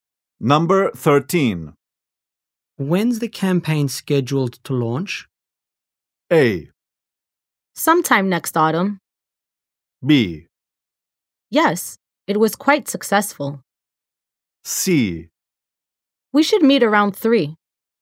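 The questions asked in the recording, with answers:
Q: When's the campaign scheduled to launch?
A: A: Sometime next autumn.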